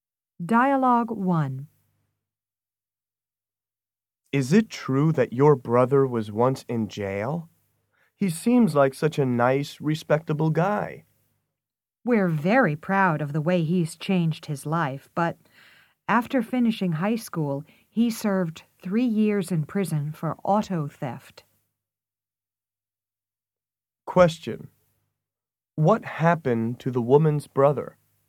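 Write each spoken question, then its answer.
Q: what happened to the woman's brother?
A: He served 3 years in prison for auto theft after high school.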